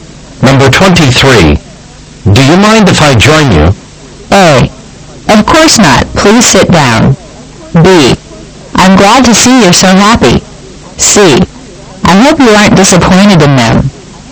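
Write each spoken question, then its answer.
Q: Do you mind if I join you?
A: A: Of course not. Please sit down.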